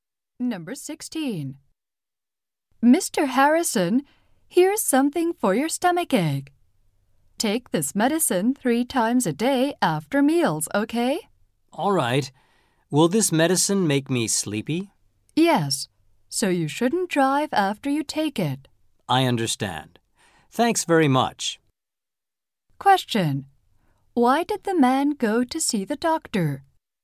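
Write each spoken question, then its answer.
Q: Question. Why did the man go to see the doctor?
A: He had a stomach ache.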